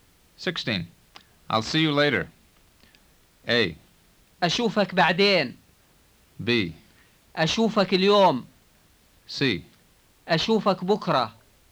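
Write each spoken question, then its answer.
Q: I'll see you later.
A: A: أشوفك بعدين.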